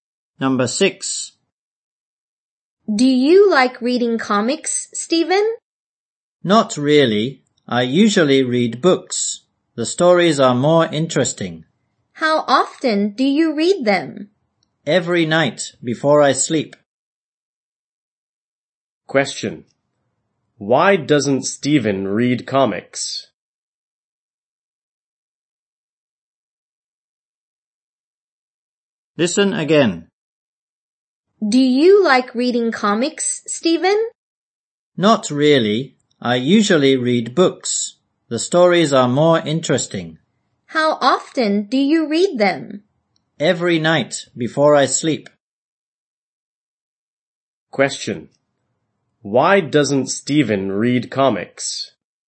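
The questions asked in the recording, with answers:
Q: Why doesn't Stephen read comics?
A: He thinks the stories in books are more interesting.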